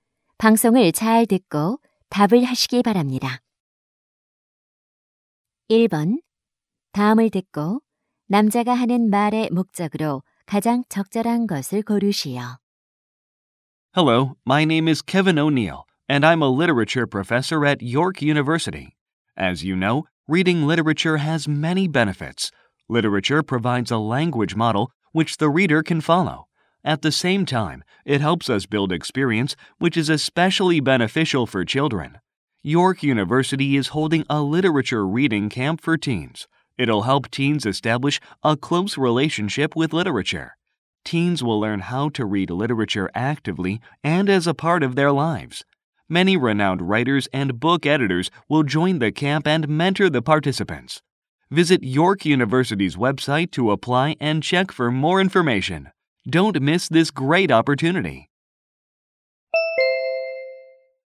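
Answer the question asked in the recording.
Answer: 청소년 문학 독서 캠프를 홍보하려고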